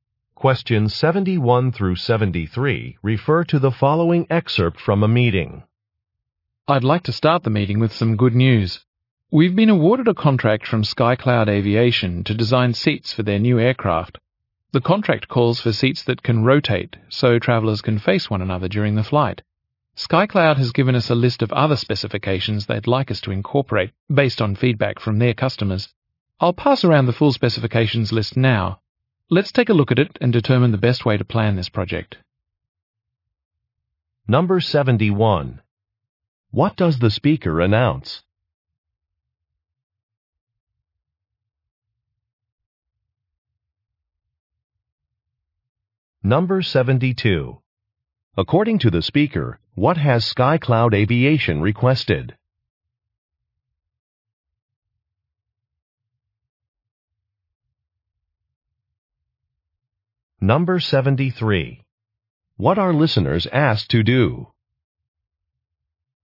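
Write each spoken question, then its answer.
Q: What does the speaker announce?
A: The company won a contract from SkyCloud Aviation to design aircraft seats

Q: According to the speaker, what has SkyCloud Aviation requested?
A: Seats that can rotate so travelers can face one another

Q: What are listeners asked to do?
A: Look at the specifications list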